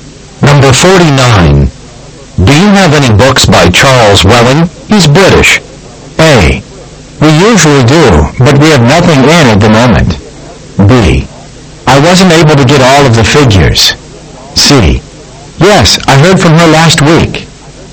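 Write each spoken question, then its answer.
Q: Do you have any books by Charles Welling?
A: A: We usually do, but we have nothing in at the moment.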